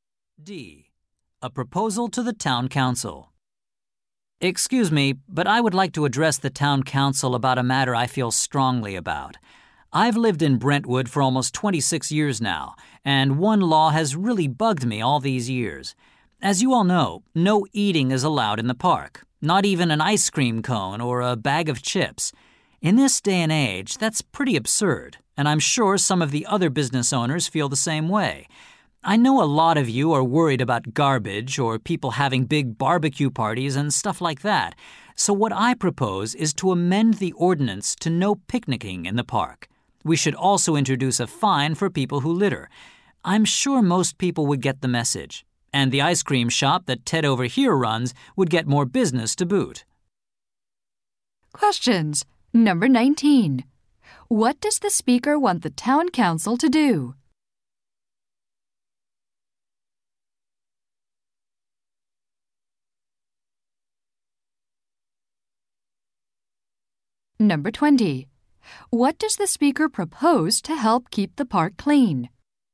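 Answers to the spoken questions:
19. Change the law so eating is allowed in the park, banning only picnicking
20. Introduce a fine for littering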